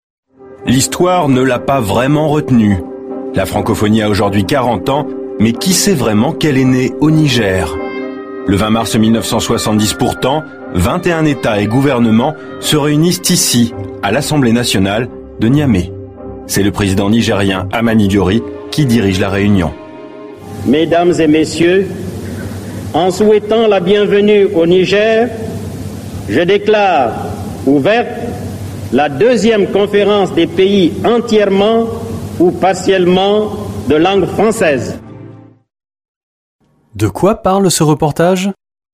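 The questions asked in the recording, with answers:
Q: De quoi parle ce reportage ?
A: De la naissance de la Francophonie au Niger, à Niamey, le 20 mars 1970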